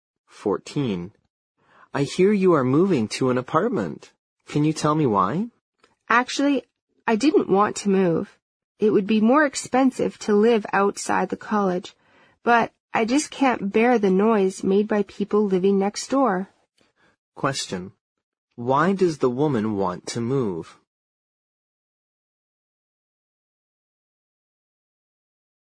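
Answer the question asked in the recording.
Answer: She can't bear the noise from the people living next door.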